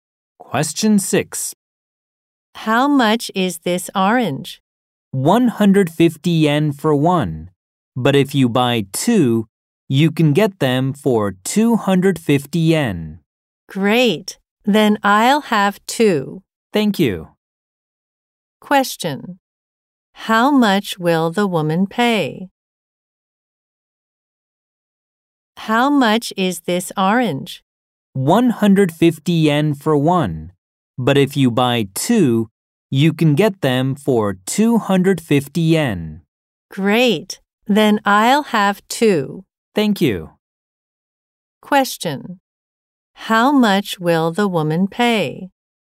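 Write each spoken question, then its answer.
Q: How much will the woman pay?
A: 250 yen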